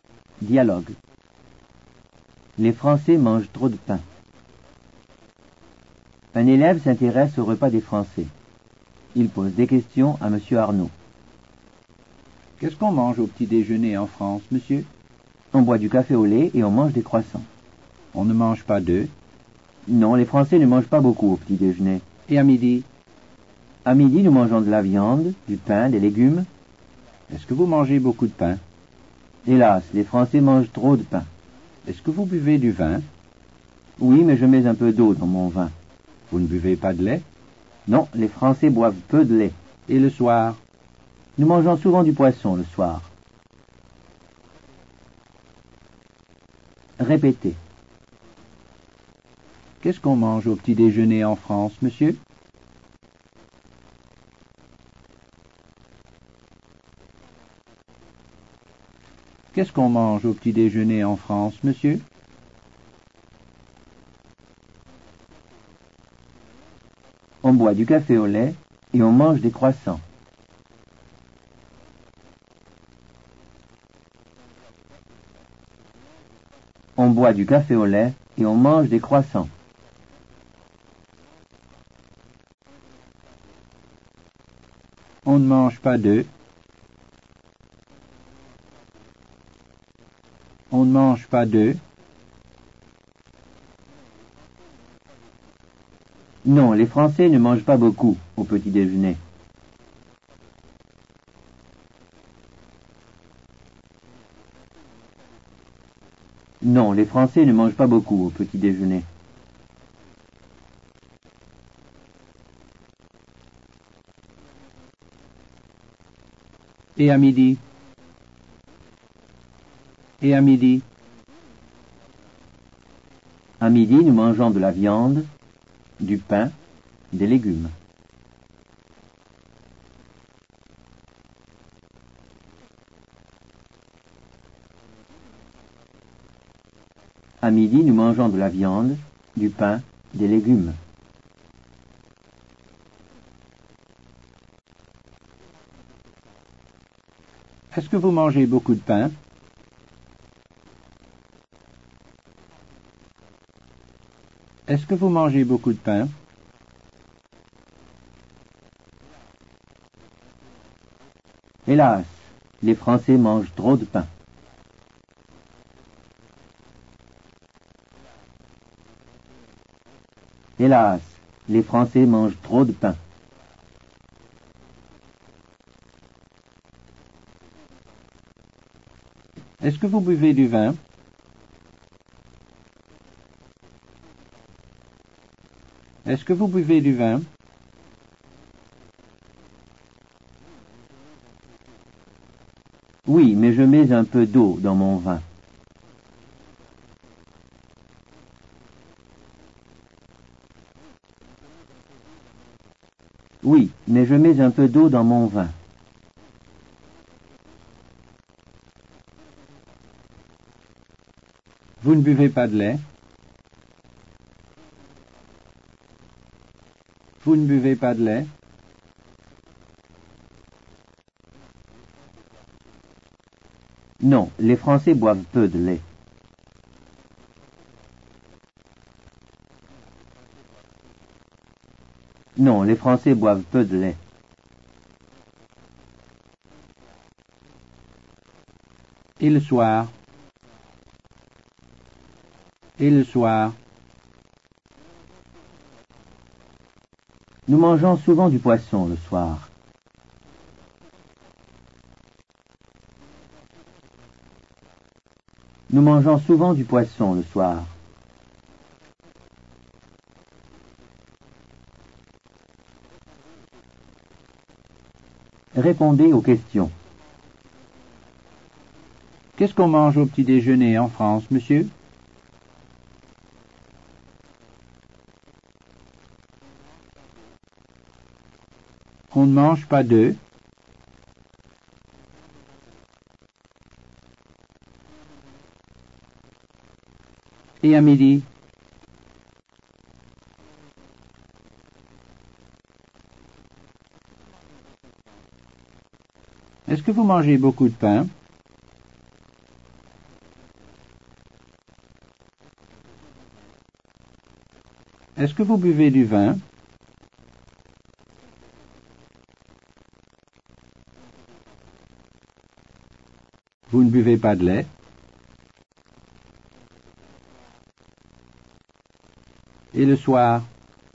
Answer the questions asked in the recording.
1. On boit du café au lait et on mange des croissants.
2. Non, les Français ne mangent pas beaucoup au petit déjeuner.
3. À midi, nous mangeons de la viande, du pain, des légumes.
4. Hélas, les Français mangent trop de pain.
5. Oui, mais je mets un peu d'eau dans mon vin.
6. Non, les Français boivent peu de lait.
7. Nous mangeons souvent du poisson le soir.